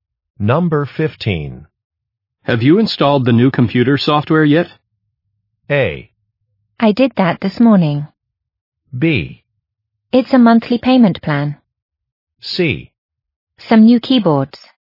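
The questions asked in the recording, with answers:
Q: Have you installed the new computer software yet?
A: A: I did that this morning.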